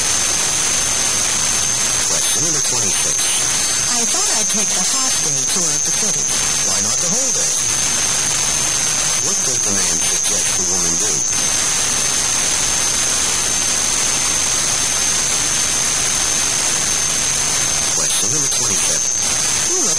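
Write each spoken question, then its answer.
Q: What does the man suggest the woman do?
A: Take the whole-day tour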